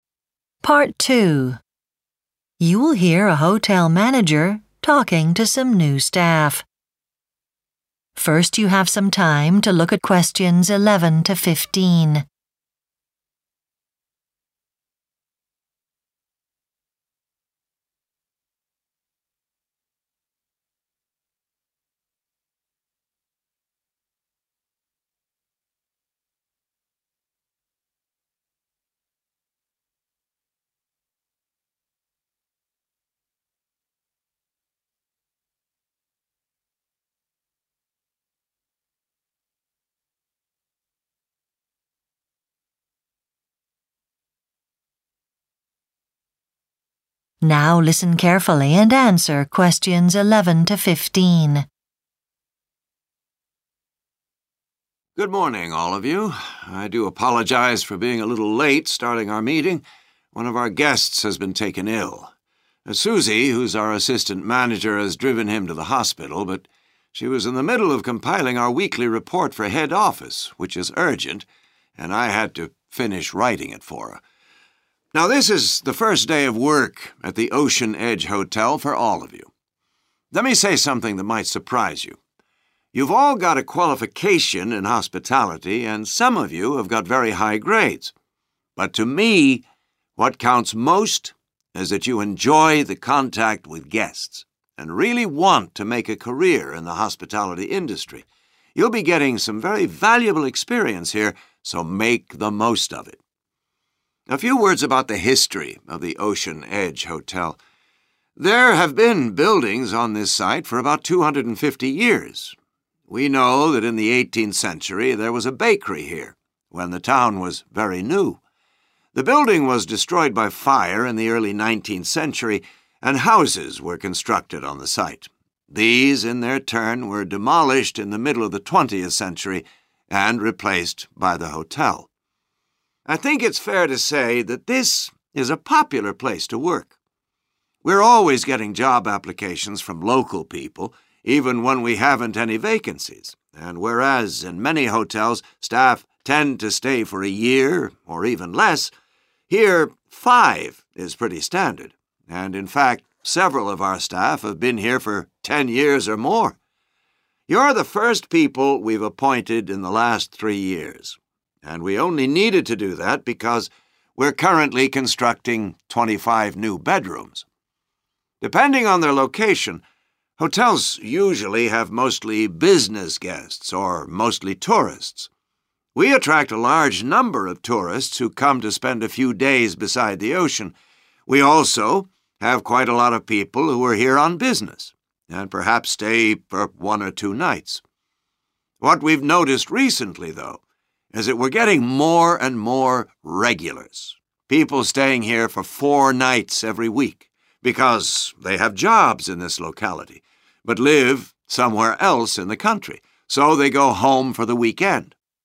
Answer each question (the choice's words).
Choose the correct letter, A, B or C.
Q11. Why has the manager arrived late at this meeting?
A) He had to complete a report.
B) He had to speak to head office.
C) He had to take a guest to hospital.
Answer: He had to complete a report.

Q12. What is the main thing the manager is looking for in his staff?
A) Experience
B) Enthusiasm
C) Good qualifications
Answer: Enthusiasm

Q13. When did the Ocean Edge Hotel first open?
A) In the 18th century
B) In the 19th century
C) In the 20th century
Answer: In the 20th century

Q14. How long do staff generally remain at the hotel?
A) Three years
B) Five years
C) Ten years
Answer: Five years

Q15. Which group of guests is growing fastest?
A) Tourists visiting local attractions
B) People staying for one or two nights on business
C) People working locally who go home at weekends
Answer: People working locally who go home at weekends